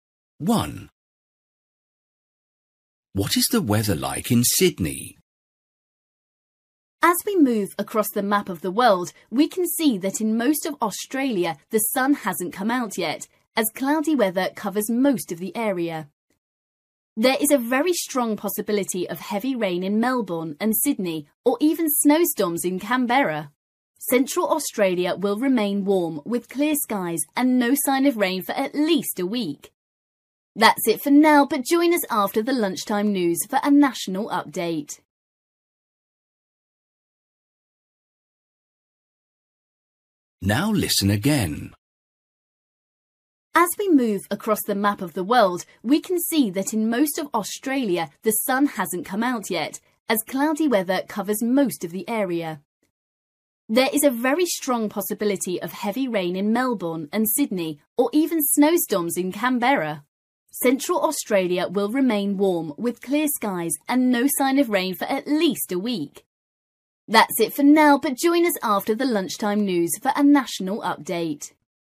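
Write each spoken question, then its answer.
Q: What is the weather like in Sydney?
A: Cloudy, with possible heavy rain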